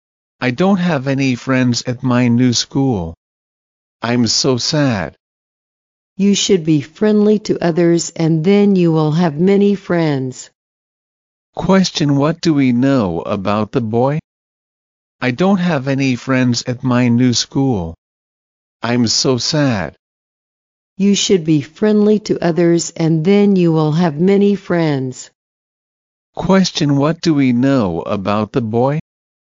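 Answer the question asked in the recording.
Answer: He has no friends at his new school and feels sad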